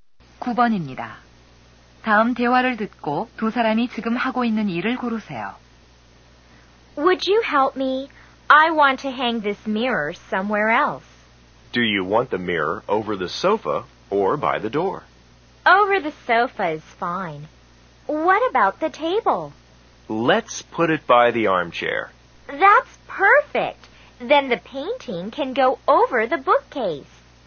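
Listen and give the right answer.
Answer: 가구 배치 바꾸기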